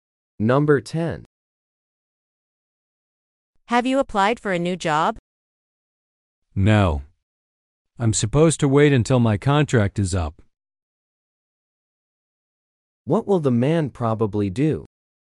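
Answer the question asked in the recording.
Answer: Wait until his contract ends before applying for a new job.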